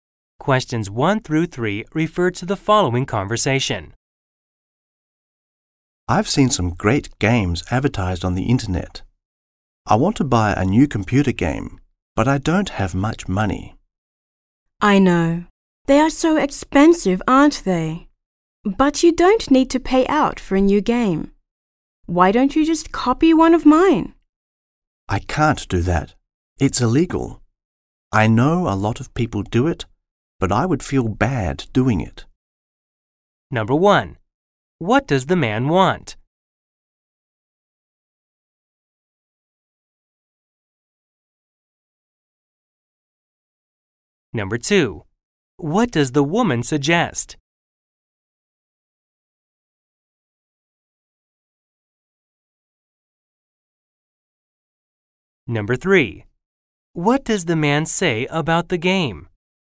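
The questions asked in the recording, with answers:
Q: What does the man want?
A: To buy a new computer game

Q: What does the woman suggest?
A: Copying one of her games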